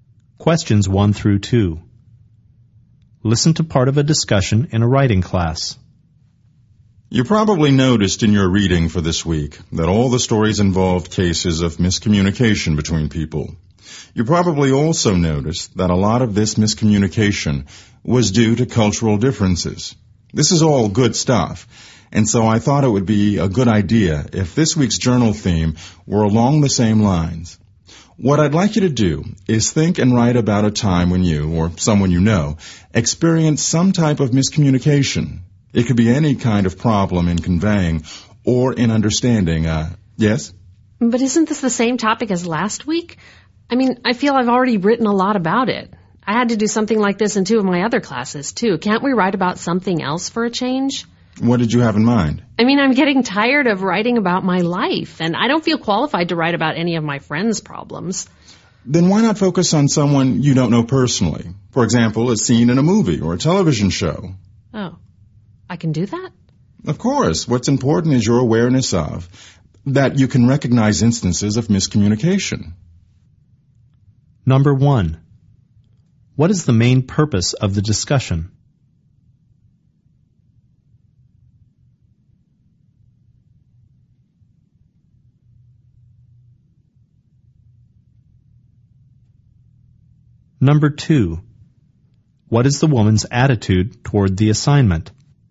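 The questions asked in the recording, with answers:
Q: What is the main purpose of the discussion?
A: To explain the journal assignment on miscommunication

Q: what is the woman's attitude toward the assignment?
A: She is tired of the topic and wants to write about something else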